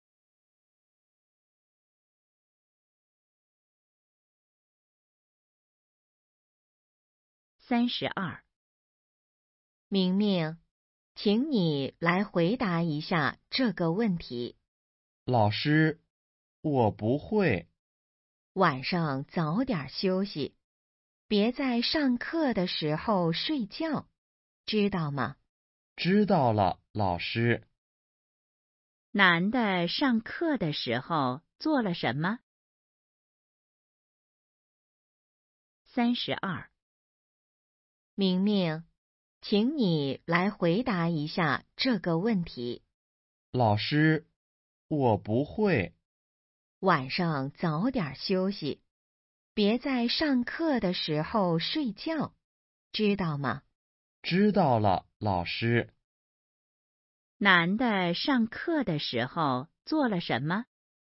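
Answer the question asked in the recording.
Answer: 睡觉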